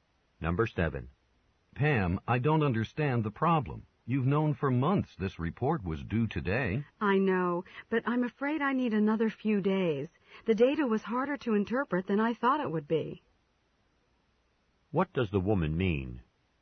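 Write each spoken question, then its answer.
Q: What does the woman mean?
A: She needs a few more days to finish the report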